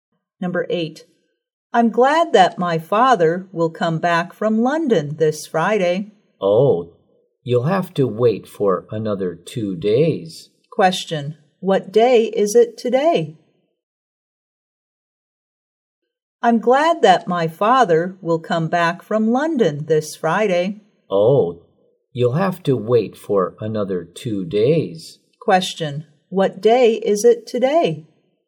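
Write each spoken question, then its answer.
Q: Question, what day is it today?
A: Wednesday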